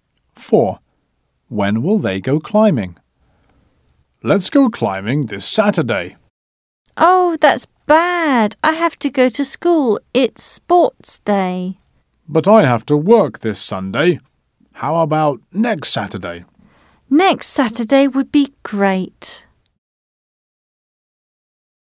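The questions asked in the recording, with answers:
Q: When will they go climbing?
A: Next Saturday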